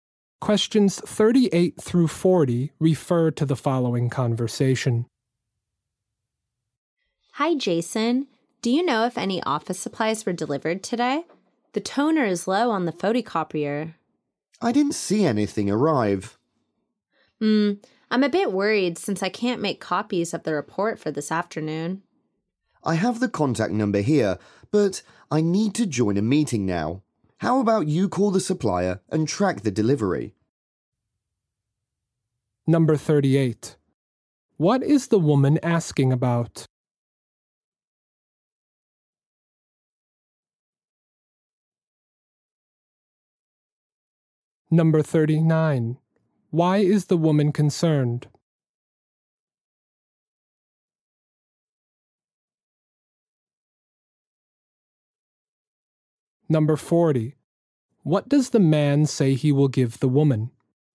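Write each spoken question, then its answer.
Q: What is the woman asking about?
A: Whether office supplies were delivered today

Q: Why is the woman concerned?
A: She can't make copies of the report for this afternoon because the toner is low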